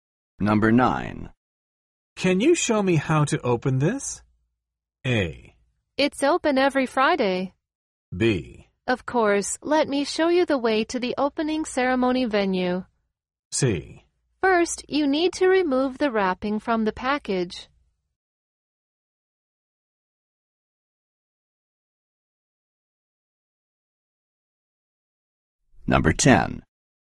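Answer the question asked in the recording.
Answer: C: First, you need to remove the wrapping from the package.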